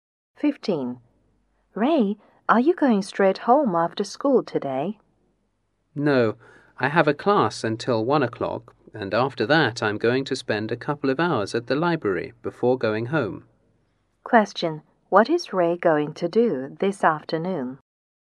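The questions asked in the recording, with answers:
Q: What is Ray going to do this afternoon?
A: Attend a class until 1 and then spend a couple of hours at the library.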